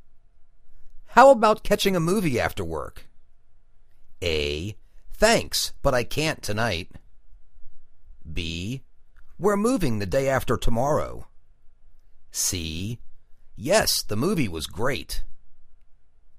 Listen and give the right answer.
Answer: Thanks, but I can't tonight.